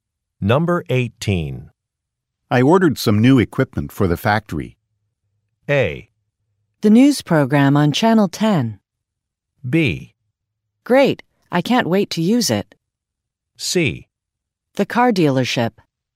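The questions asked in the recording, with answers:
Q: I ordered some new equipment for the factory.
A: B: Great, I can't wait to use it.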